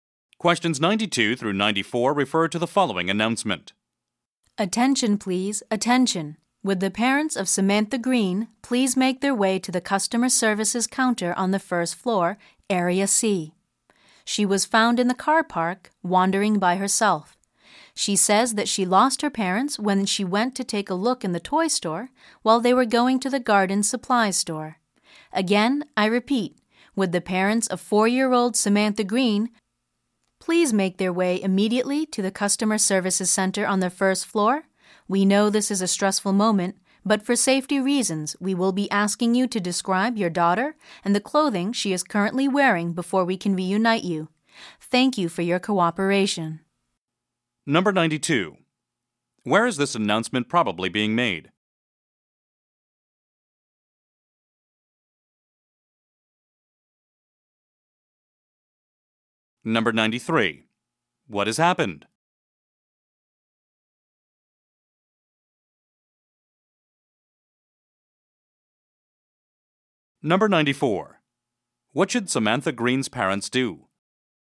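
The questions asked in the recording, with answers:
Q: Where is this announcement probably being made?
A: In a shopping center/store

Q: What has happened?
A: A child was lost and found

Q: What should Samantha Green's parents do?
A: Go to the customer services counter on the first floor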